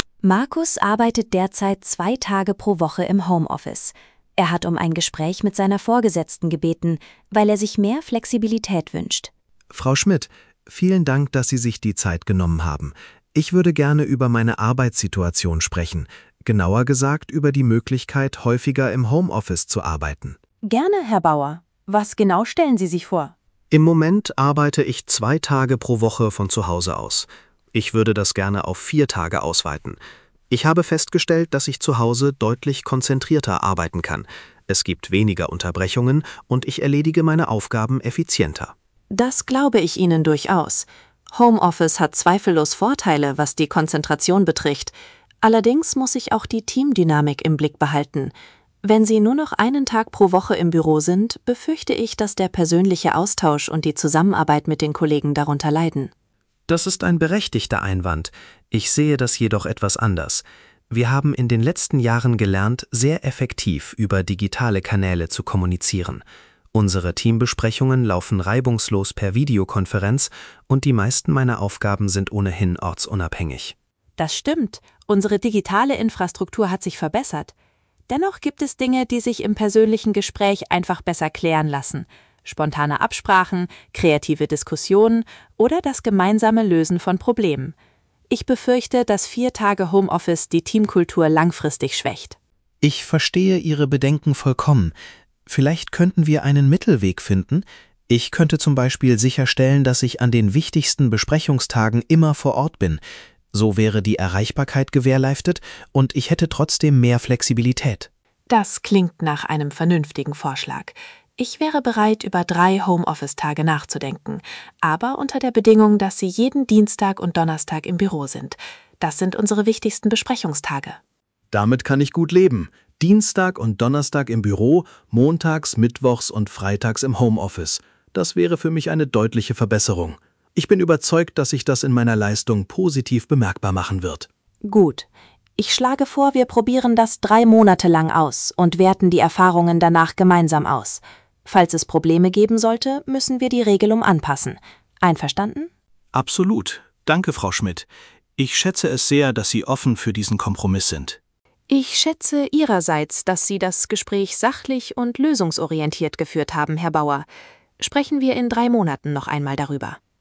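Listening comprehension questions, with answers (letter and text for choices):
Fülle die Lücken mit den passenden Wörtern aus dem Dialog.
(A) Homeoffice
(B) Kompromiss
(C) Zusammenarbeit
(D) Büro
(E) Monate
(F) konzentrierter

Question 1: Markus bittet Frau Schmidt um ein Gespräch, weil er häufiger im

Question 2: arbeiten möchte. Er erklärt, dass er zu Hause deutlich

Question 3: arbeiten kann. Frau Schmidt hat Bedenken wegen der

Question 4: im Team. Sie einigen sich schließlich auf einen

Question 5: Markus darf drei Tage von zu Hause arbeiten, muss aber dienstags und donnerstags im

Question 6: sein. Die neue Regelung wird zunächst drei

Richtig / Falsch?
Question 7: Markus möchte fünf Tage pro Woche im Homeoffice arbeiten.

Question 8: Markus arbeitet derzeit zwei Tage pro Woche von zu Hause.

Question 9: Frau Schmidt ist grundsätzlich gegen jede Form von Homeoffice.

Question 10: Der Kompromiss sieht vor, dass Markus drei Tage im Homeoffice arbeitet.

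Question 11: Die Probezeit für die neue Regelung beträgt sechs Monate.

Lies den Dialog und beantworte die Fragen. Klicke am Ende auf Antworten prüfen.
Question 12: Warum möchte Markus mehr im Homeoffice arbeiten?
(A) Weil er die Kollegen nicht mag.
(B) Weil er zu Hause konzentrierter und effizienter arbeitet.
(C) Weil der Weg ins Büro zu weit ist.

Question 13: Was ist Frau Schmidts größte Sorge?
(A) Dass Markus insgesamt weniger arbeiten wird.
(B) Dass der persönliche Austausch und die Teamdynamik leiden.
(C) Dass die Videokonferenztechnik nicht zuverlässig genug ist.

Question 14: Welcher Kompromiss wird vereinbart?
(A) Markus bleibt bei zwei Homeoffice-Tagen.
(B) Markus darf vier Tage im Homeoffice arbeiten.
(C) Markus arbeitet drei Tage im Homeoffice und ist dienstags und donnerstags im Büro.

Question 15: Was schlägt Frau Schmidt am Ende vor?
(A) Eine dauerhafte Regelung ohne weitere Überprüfung.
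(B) Eine dreimonatige Probezeit mit anschließender gemeinsamer Auswertung.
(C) Ein Gespräch mit der Personalabteilung.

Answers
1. (A) Homeoffice
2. (F) konzentrierter
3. (C) Zusammenarbeit
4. (B) Kompromiss
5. (D) Büro
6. (E) Monate
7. Falsch
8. Richtig
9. Falsch
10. Richtig
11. Falsch
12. (B) Weil er zu Hause konzentrierter und effizienter arbeitet.
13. (B) Dass der persönliche Austausch und die Teamdynamik leiden.
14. (C) Markus arbeitet drei Tage im Homeoffice und ist dienstags und donnerstags im Büro.
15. (B) Eine dreimonatige Probezeit mit anschließender gemeinsamer Auswertung.

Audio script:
Markus arbeitet derzeit zwei Tage pro Woche im Homeoffice. Er hat um ein Gespräch mit seiner Vorgesetzten gebeten, weil er sich mehr Flexibilität wünscht.
Markus:
Frau Schmidt, vielen Dank, dass Sie sich die Zeit genommen haben. Ich würde gerne über meine Arbeitssituation sprechen – genauer gesagt über die Möglichkeit, häufiger im Homeoffice zu arbeiten.
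Frau Schmidt:
Gerne, Herr Bauer. Was genau stellen Sie sich vor?
Markus:
Im Moment arbeite ich zwei Tage pro Woche von zu Hause aus. Ich würde das gerne auf vier Tage ausweiten. Ich habe festgestellt, dass ich zu Hause deutlich konzentrierter arbeiten kann. Es gibt weniger Unterbrechungen, und ich erledige meine Aufgaben effizienter.
Frau Schmidt:
Das glaube ich Ihnen durchaus. Homeoffice hat zweifellos Vorteile, was die Konzentration betrifft. Allerdings muss ich auch die Teamdynamik im Blick behalten. Wenn Sie nur noch einen Tag pro Woche im Büro sind, befürchte ich, dass der persönliche Austausch und die Zusammenarbeit mit den Kollegen darunter leiden.
Markus:
Das ist ein berechtigter Einwand. Ich sehe das jedoch etwas anders: Wir haben in den letzten Jahren gelernt, sehr effektiv über digitale Kanäle zu kommunizieren. Unsere Teambesprechungen laufen reibungslos per Videokonferenz, und die meisten meiner Aufgaben sind ohnehin ortsunabhängig.
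Frau Schmidt:
Das stimmt, unsere digitale Infrastruktur hat sich verbessert. Dennoch gibt es Dinge, die sich im persönlichen Gespräch einfach besser klären lassen – spontane Absprachen, kreative Diskussionen oder das gemeinsame Lösen von Problemen. Ich befürchte, dass vier Tage Homeoffice die Teamkultur langfristig schwächt.
Markus:
Ich verstehe Ihre Bedenken vollkommen. Vielleicht könnten wir einen Mittelweg finden? Ich könnte zum Beispiel sicherstellen, dass ich an den wichtigsten Besprechungstagen immer vor Ort bin. So wäre die Erreichbarkeit gewährleistet, und ich hätte trotzdem mehr Flexibilität.
Frau Schmidt:
Das klingt nach einem vernünftigen Vorschlag. Ich wäre bereit, über drei Homeoffice-Tage nachzudenken – aber unter der Bedingung, dass Sie jeden Dienstag und Donnerstag im Büro sind. Das sind unsere wichtigsten Besprechungstage.
Markus:
Damit kann ich gut leben. Dienstag und Donnerstag im Büro, montags, mittwochs und freitags im Homeoffice – das wäre für mich eine deutliche Verbesserung. 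Ich bin überzeugt, dass sich das in meiner Leistung positiv bemerkbar machen wird.
Frau Schmidt:
Gut. Ich schlage vor, wir probieren das drei Monate lang aus und werten die Erfahrungen danach gemeinsam aus. Falls es Probleme geben sollte, müssen wir die Regelung anpassen. Einverstanden?
Markus:
Absolut. Danke, Frau Schmidt. Ich schätze es sehr, dass Sie offen für diesen Kompromiss sind.
Frau Schmidt:
Ich schätze Ihrerseits, dass Sie das Gespräch sachlich und lösungsorientiert geführt haben, Herr Bauer. Sprechen wir in drei Monaten noch einmal darüber.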